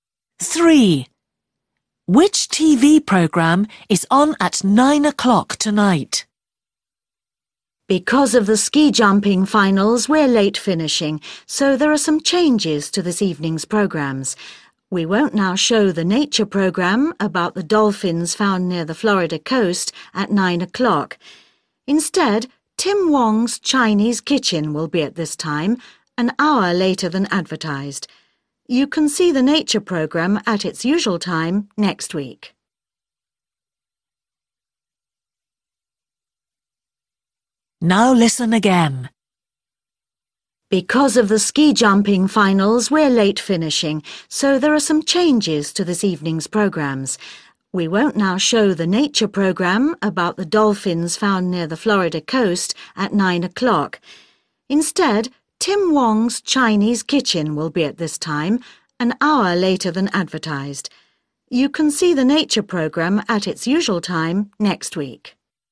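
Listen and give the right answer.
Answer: Tim Wong's Chinese Kitchen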